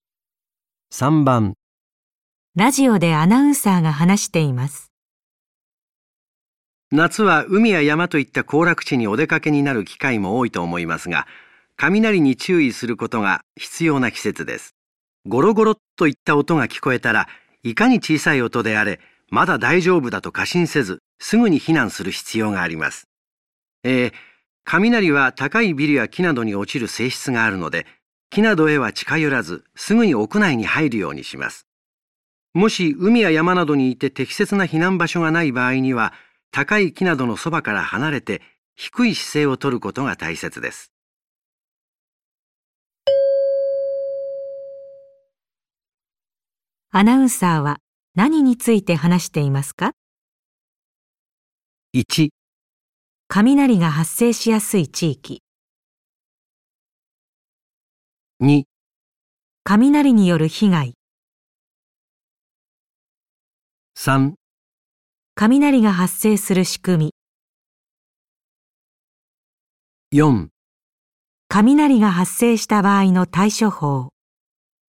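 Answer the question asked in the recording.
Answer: 雷が発生した場合の対処法。

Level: N1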